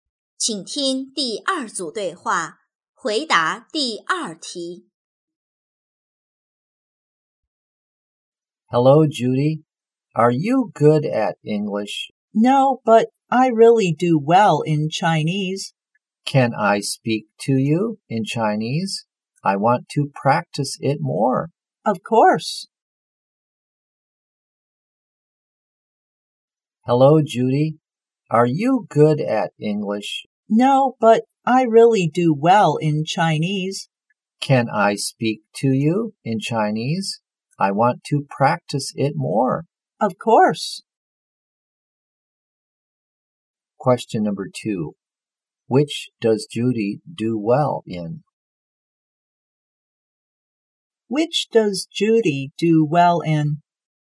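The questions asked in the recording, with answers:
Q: Which does Judy do well in?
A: Chinese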